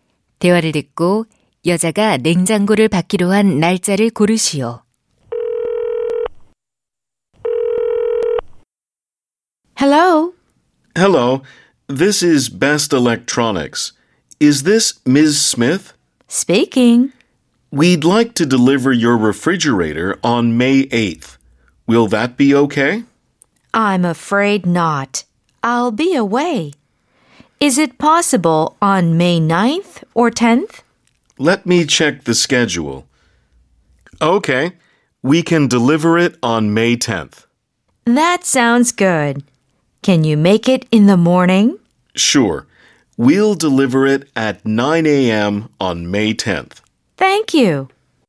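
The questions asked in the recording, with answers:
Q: 대화를 듣고 여자가 냉장고를 받기로 한 날짜를 고르시오.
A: 5월 10일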